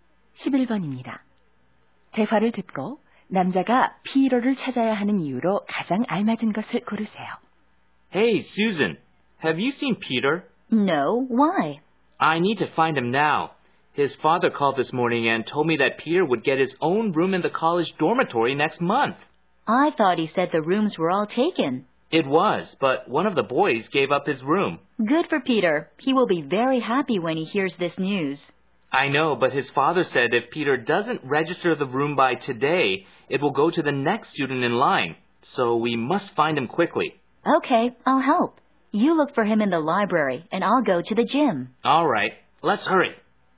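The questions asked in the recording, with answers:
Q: 대화를 듣고 남자가 피로를 찾아야 하는 이유로 가장 알맞은 것을 고르세요.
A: 오늘까지 기숙사 방을 등록해야 해서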